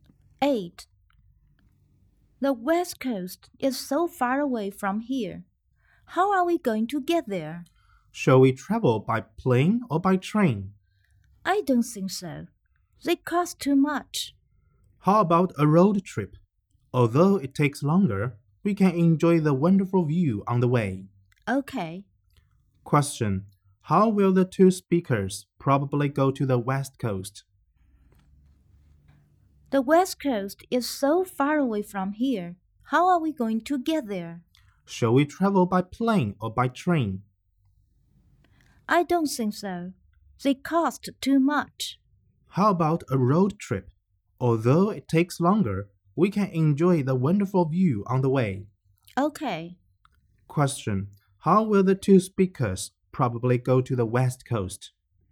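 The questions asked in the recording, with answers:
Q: How will the two speakers probably go to the West Coast?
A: By car, on a road trip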